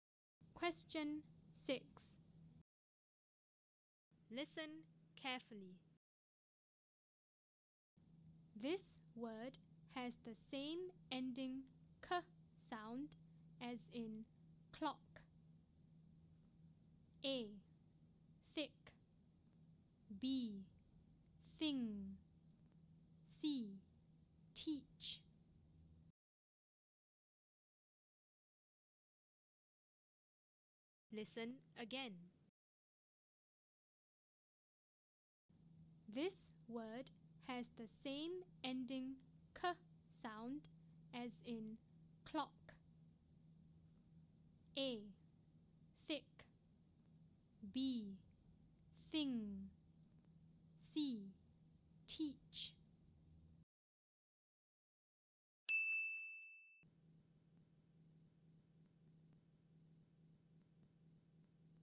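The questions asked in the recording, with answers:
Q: This word has the same ending k sound as in clock.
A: A: Thick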